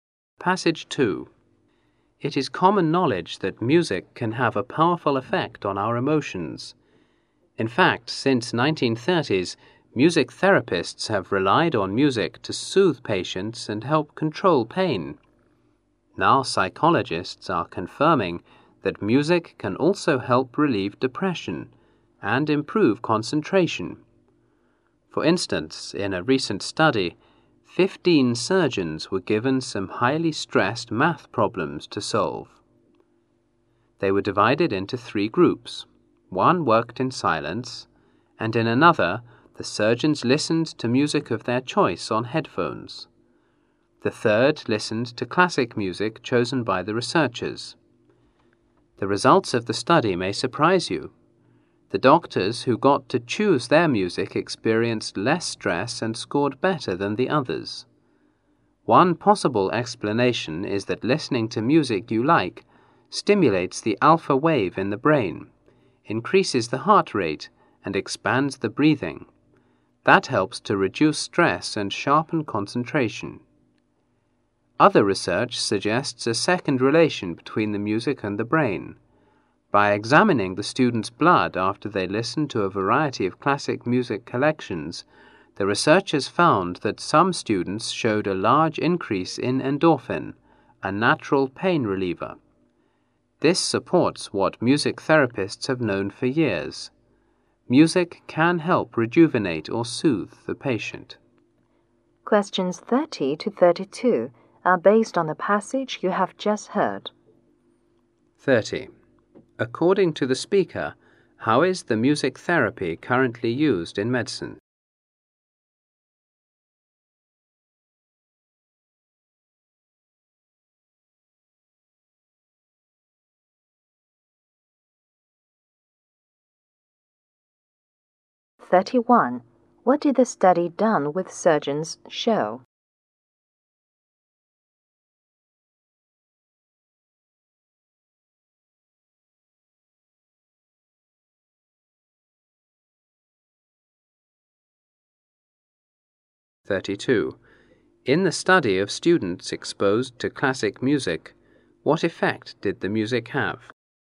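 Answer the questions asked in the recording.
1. To soothe patients and help control pain
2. Surgeons who chose their own music had less stress and scored better
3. Some showed a large increase in endorphin, a natural pain reliever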